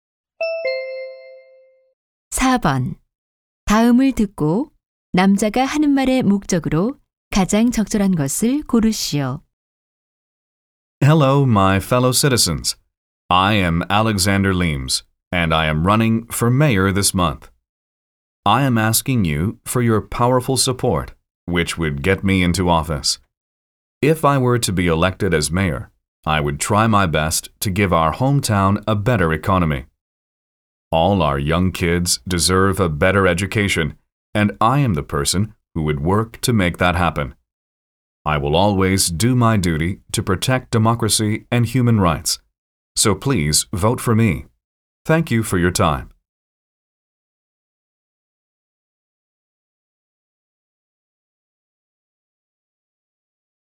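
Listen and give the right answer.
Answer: 시장 선거에서 자신에게 투표해 달라고 호소하려고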